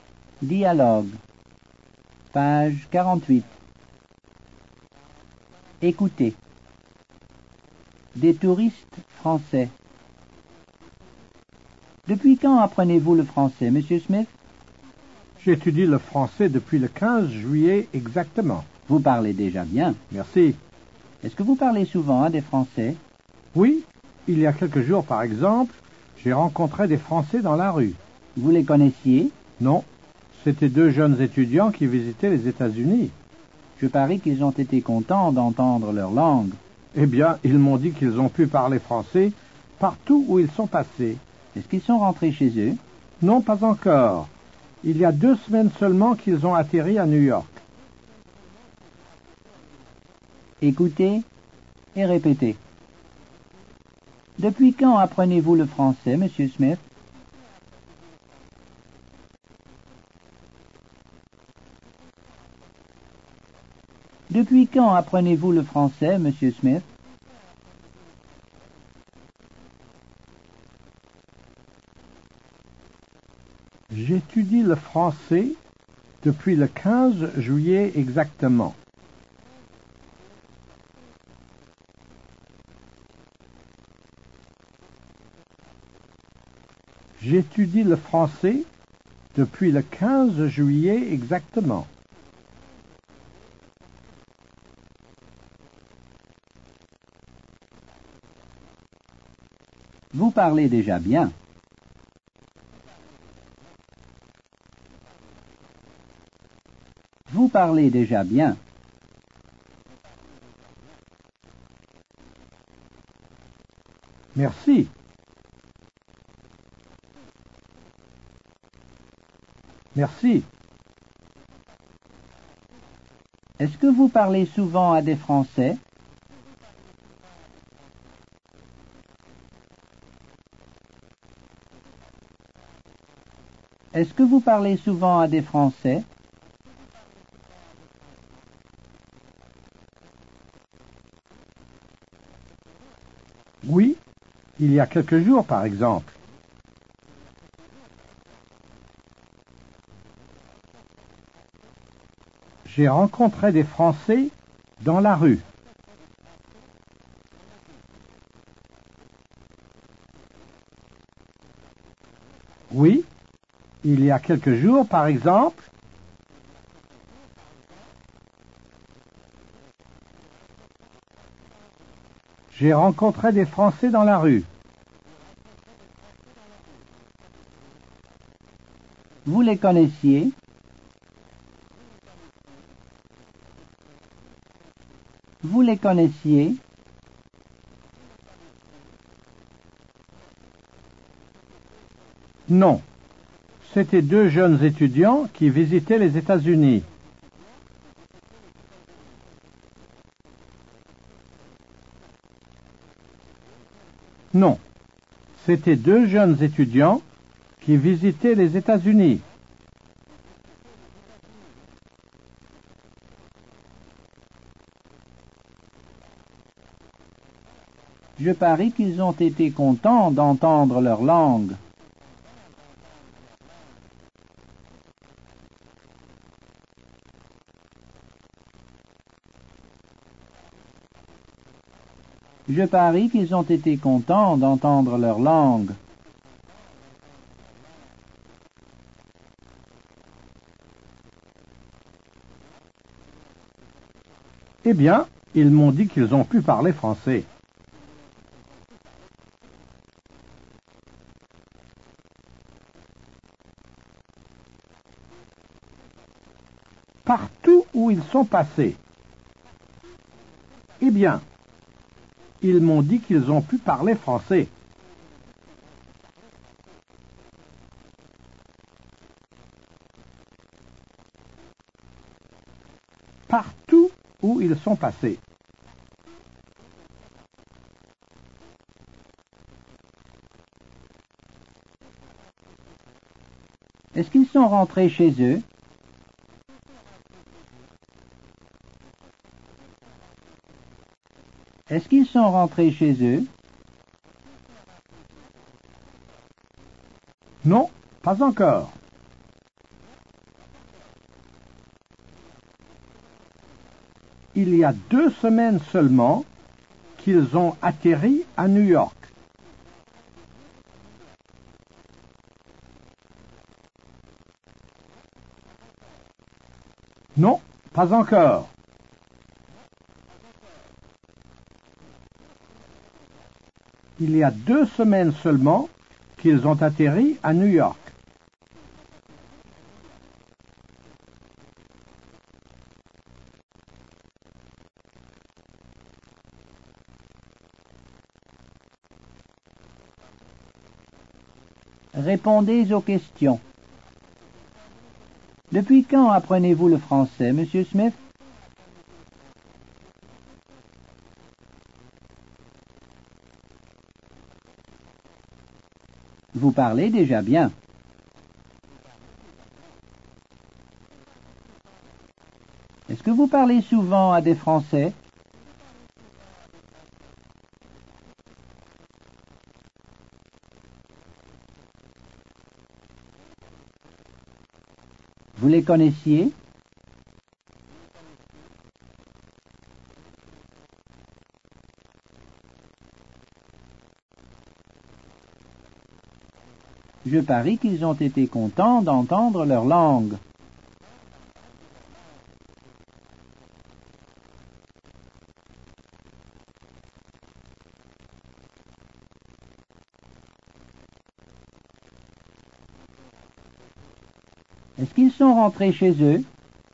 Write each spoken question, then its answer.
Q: Depuis quand apprenez-vous le français, Monsieur Smith?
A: J'étudie le français depuis le 15 juillet exactement.

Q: Est-ce que vous parlez souvent à des Français?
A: Oui, il y a quelques jours, par exemple, j'ai rencontré des Français dans la rue.

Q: Vous les connaissiez?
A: Non, c'était deux jeunes étudiants qui visitaient les États-Unis.

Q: Est-ce qu'ils sont rentrés chez eux?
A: Non, pas encore. Il y a deux semaines seulement qu'ils ont atterri à New York.